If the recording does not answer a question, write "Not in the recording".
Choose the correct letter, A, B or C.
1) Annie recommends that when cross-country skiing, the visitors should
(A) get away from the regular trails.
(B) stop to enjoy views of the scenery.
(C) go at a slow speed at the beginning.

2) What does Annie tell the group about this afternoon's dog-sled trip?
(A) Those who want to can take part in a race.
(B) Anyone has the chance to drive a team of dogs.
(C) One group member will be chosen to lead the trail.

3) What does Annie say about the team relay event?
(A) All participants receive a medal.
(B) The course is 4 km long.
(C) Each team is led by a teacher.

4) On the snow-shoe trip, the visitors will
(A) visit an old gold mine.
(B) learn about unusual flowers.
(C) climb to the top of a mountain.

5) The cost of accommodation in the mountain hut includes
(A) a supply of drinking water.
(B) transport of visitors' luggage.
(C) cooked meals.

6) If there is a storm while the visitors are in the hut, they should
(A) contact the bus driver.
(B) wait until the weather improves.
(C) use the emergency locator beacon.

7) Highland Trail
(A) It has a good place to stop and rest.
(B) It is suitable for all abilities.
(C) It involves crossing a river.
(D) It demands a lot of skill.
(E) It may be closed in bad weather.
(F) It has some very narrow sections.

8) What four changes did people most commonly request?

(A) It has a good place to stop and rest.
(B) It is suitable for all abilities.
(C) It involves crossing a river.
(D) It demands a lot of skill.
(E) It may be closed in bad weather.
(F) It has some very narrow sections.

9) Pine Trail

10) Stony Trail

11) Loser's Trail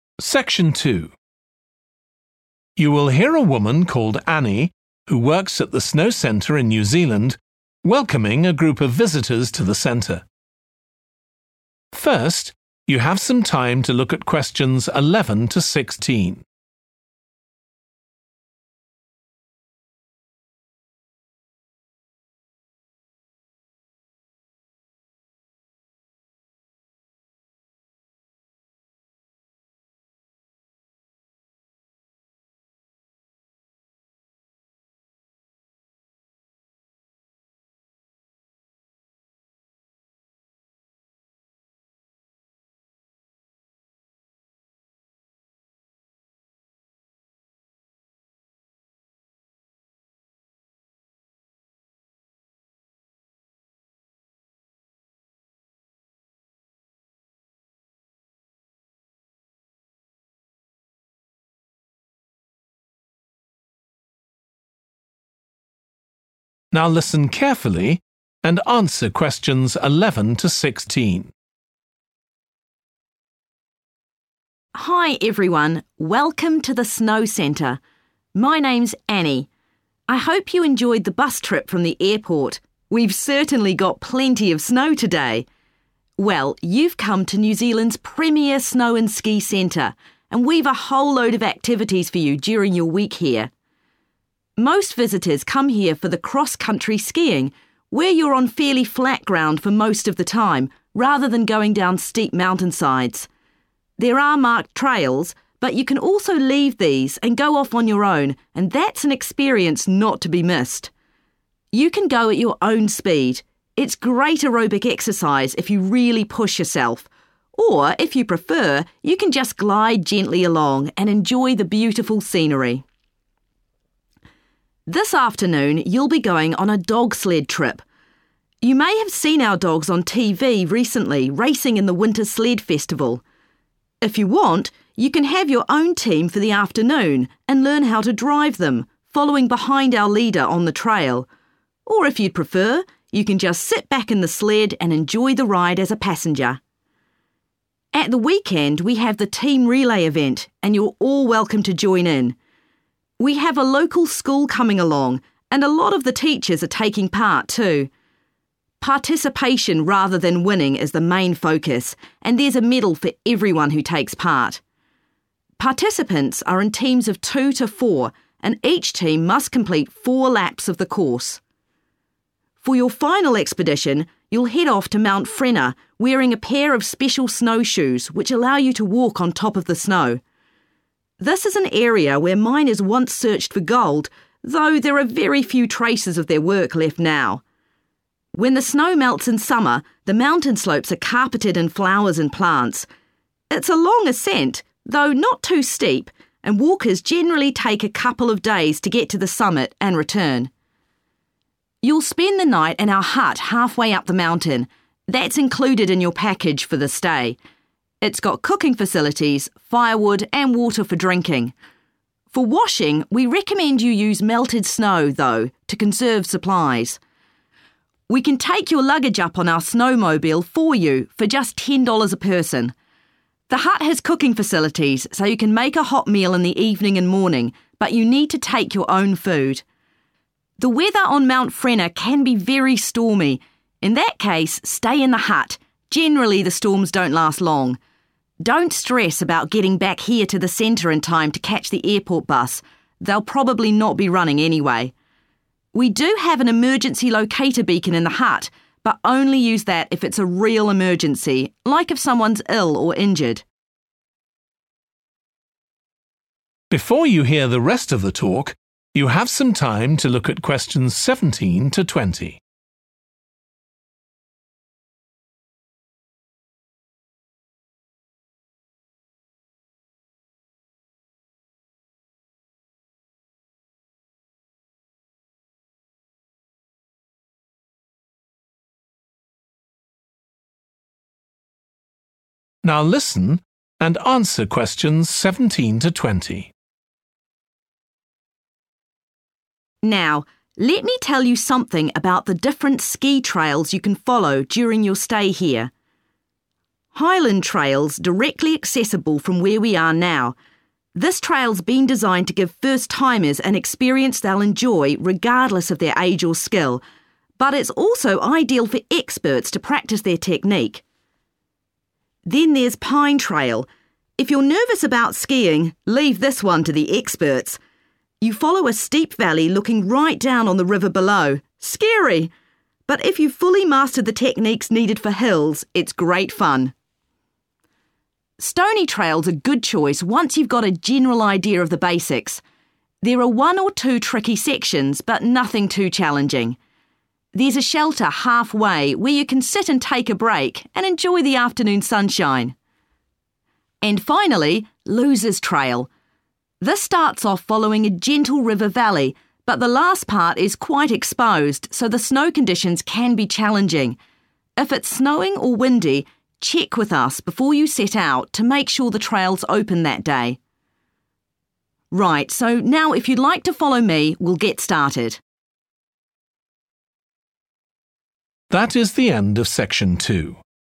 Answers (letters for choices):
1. A
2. B
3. A
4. C
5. A
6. B
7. B
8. Not in the recording
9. D
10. A
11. E

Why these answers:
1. The correct answer is A because the excerpt mentions that visitors can leave the marked trails and have a unique experience by going off on their own. This aligns with the recommendation given in answer A, which is to get away from the regular trails.
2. The correct answer is 'B' because it aligns with the transcript where it states that individuals can have their own team of dogs during the dog-sled trip and learn to drive them, implying that anyone has the chance to drive a team of dogs.
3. The correct answer is A because it directly matches the information in the excerpt where it states that there will be a medal for everyone who takes part, supporting the fact that all participants in the team relay event will receive a medal.
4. The correct answer is 'C,' which is climbing to the top of a mountain, because the excerpt mentions that walkers take a couple of days to get to the summit, implying that the visitors will indeed be climbing to the top of a mountain during the trip.
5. The correct answer (A) is supported by the excerpt as it states that water for drinking is provided. This matches the inclusion of a supply of drinking water mentioned in choice A.
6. The correct answer is B because the excerpt suggests that it is safe to wait in the hut during a storm since storms generally pass quickly.
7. The correct answer is B because the transcript says the trail is for both beginners and experts, meaning it's suitable for all skill levels.
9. The correct answer is 'D' because the excerpt mentions that for enjoying Pine Trail, you need to have fully mastered the techniques required for hills, indicating that it is a challenging trail that requires a lot of skill to ski on.
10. The correct answer is A because the excerpt says there is a shelter on Stony Trail where people can stop and rest. This means Stony Trail has a good place to stop and rest.
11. The correct answer is 'E' because the excerpt implies that the trail's availability is subject to weather conditions, so it may be closed in bad weather to ensure safety for skiers.

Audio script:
Hi everyone, welcome to the Snow Centre. My name's Annie. I hope you enjoyed the bus trip from the airport – we've certainly got plenty of snow today! Well, you've come to New Zealand's premier snow and ski centre, and we've a whole load of activities for you during your week here.
Most visitors come here for the cross-country skiing, where you're on fairly flat ground for most of the time, rather than going down steep mountainsides. There are marked trails, but you can also leave these and go off on your own and that's an experience not to be missed. You can go at your own speed – it's great aerobic exercise if you really push yourself, or if you prefer you can just glide gently along and enjoy the beautiful scenery.
This afternoon, you'll be going on a dog-sled trip. You may have seen our dogs on TV recently racing in the winter sled festival. If you want, you can have your own team for the afternoon and learn how to drive them, following behind our leader on the trail. Or if you'd prefer, you can just sit back in the sled and enjoy the ride as a passenger.
At the weekend, we have the team relay event, and you're all welcome to join in. We have a local school coming along, and a lot of the teachers are taking part too. Participation rather than winning is the main focus, and there's a medal for everyone who takes part. Participants are in teams of two to four, and each team must complete four laps of the course.
For your final expedition, you'll head off to Mount Frenner wearing a pair of special snow shoes which allow you to walk on top of the snow. This is an area where miners once searched for gold, though there are very few traces of their work left now. When the snow melts in summer, the mountain slopes are carpeted in flowers and plants. It's a long ascent, though not too steep, and walkers generally take a couple of days to get to the summit and return.
You'll spend the night in our hut half-way up the mountain. That's included in your package for the stay. It's got cooking facilities, firewood and water for drinking. For washing, we recommend you use melted snow, though, to conserve supplies. We can take your luggage up on our snowmobile for you for just ten dollars a person. The hut has cooking facilities so you can make a hot meal in the evening and morning, but you need to take your own food.
The weather on Mount Frenner can be very stormy. In that case, stay in the hut – generally the storms don't last long. Don't stress about getting back here to the centre in time to catch the airport bus – they'll probably not be running anyway. We do have an emergency locator beacon in the hut but only use that if it's real emergency, like if someone's ill or injured.
Now, let me tell you something about the different ski trails you can follow during your stay here.
Highland Trail's directly accessible from where we are now. This trail's been designed to give first-timers an experience they'll enjoy regardless of their age or skill, but it's also ideal for experts to practise their technique.
Then there's Pine Trail ... if you're nervous about skiing, leave this one to the experts! You follow a steep valley looking right down on the river below – scary! But if you've fully mastered the techniques needed for hills, it's great fun.
Stony Trail's a good choice once you've got a general idea of the basics. There are one or two tricky sections, but nothing too challenging. There's a shelter half-way where you can sit and take a break and enjoy the afternoon sunshine.
And finally, Loser's Trail. This starts off following a gentle river valley but the last part is quite exposed so the snow conditions can be challenging – if it's snowing or windy, check with us before you set out to make sure the trail's open that day.
Right, so now if you'd like to follow me, we'll get started ...